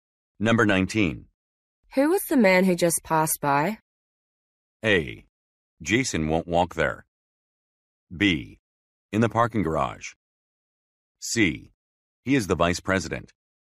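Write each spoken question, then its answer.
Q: Who was the man who just passed by?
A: C: He is the vice president.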